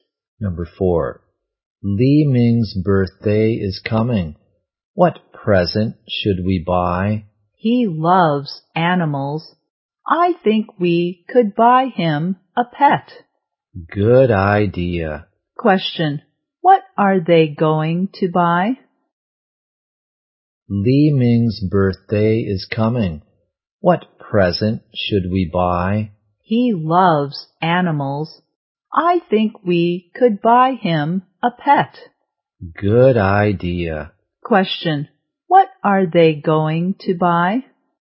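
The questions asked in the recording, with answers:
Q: What are they going to buy?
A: A pet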